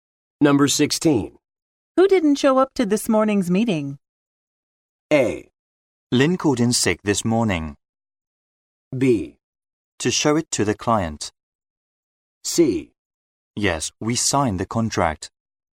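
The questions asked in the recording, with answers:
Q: Who didn't show up to this morning's meeting?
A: A: Lynn called in sick this morning.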